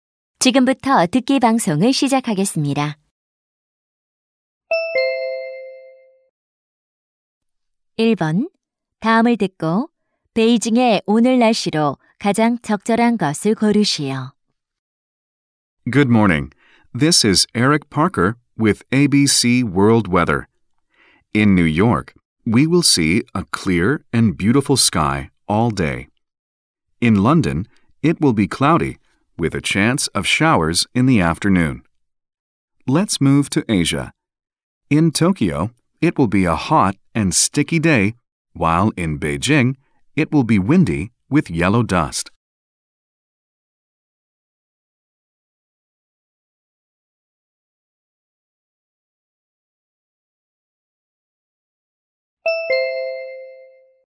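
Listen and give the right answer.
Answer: 바람이 불고 황사가 있음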